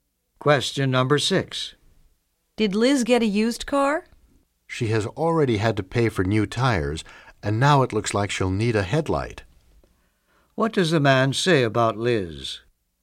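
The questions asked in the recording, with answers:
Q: What does the man say about Liz?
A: Her used car keeps needing repairs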